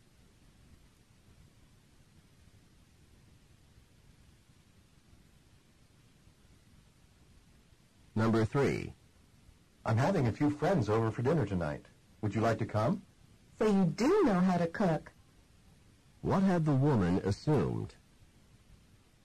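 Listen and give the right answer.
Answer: That the man did not know how to cook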